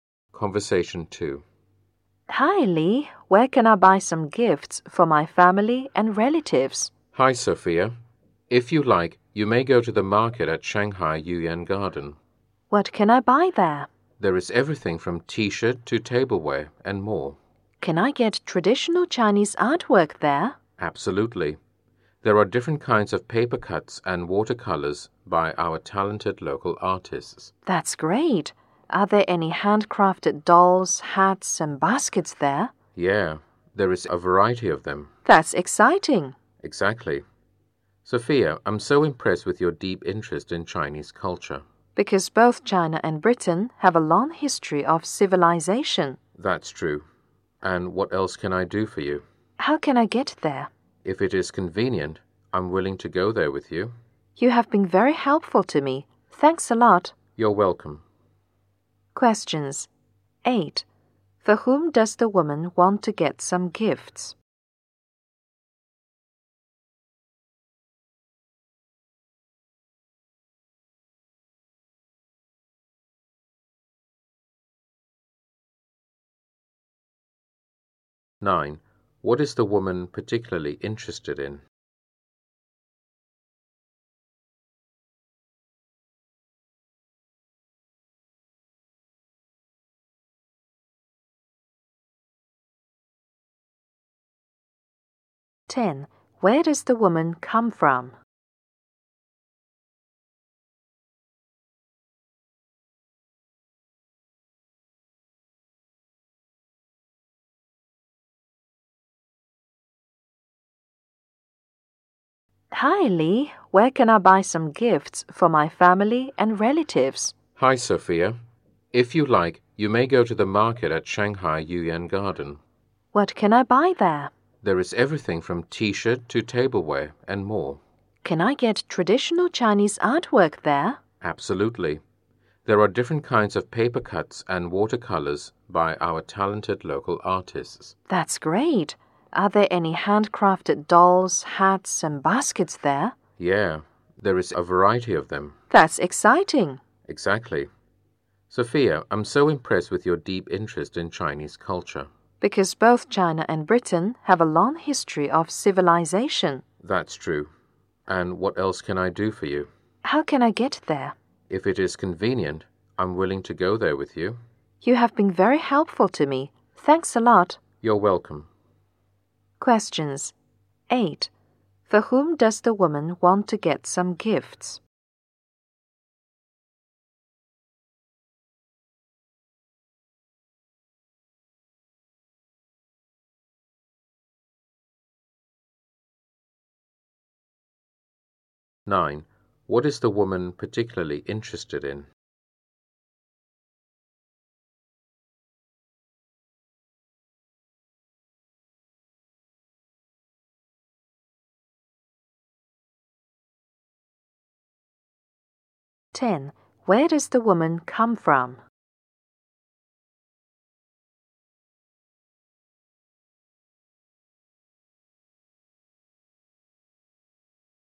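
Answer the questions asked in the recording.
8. Her family and relatives
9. Chinese culture
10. Britain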